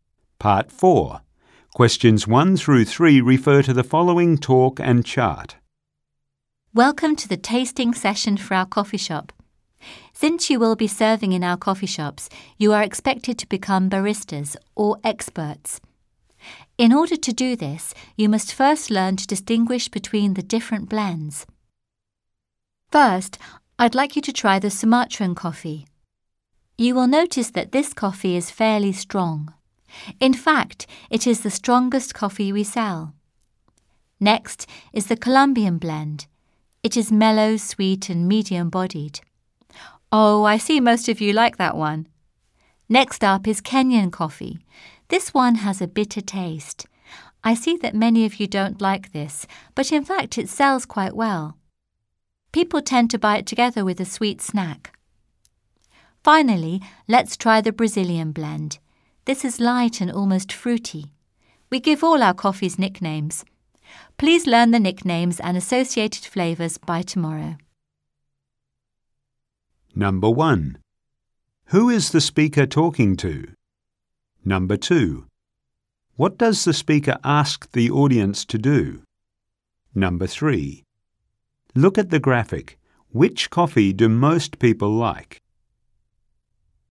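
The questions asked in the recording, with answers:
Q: Who is the speaker talking to?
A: New coffee shop staff being trained as baristas

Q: What does the speaker ask the audience to do?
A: Learn the coffees' nicknames and their flavours by tomorrow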